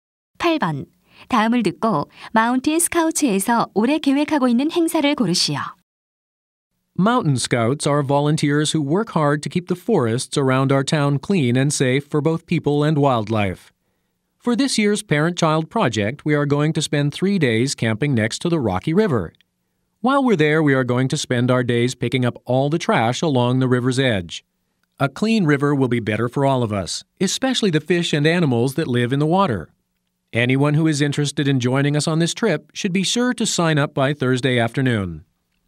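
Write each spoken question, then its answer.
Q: 다음을 듣고 마운틴 스카우츠에서 올해 계획하고 있는 행사를 고르시오.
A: 강가에서 3일간 캠핑하며 쓰레기 줍기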